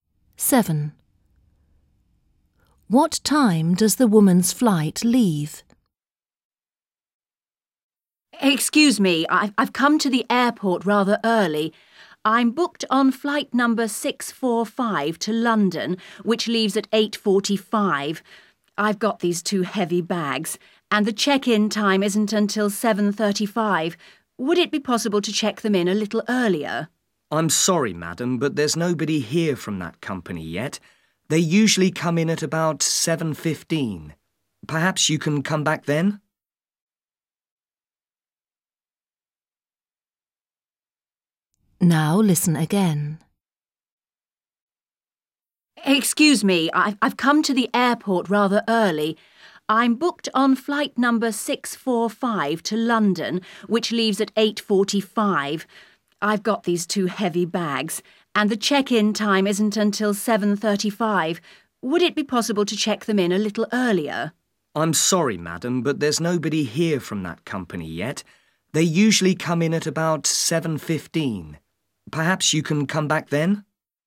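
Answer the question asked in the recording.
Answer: 8:45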